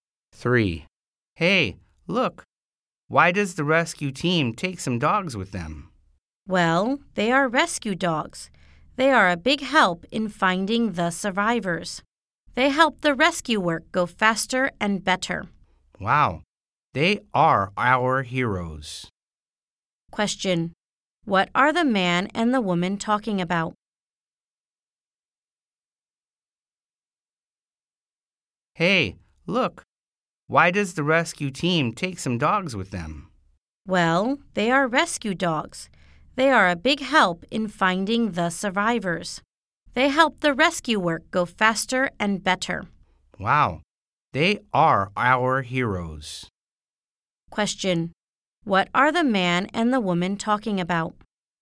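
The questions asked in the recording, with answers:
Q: What are the man and the woman talking about?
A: Rescue dogs that help find survivors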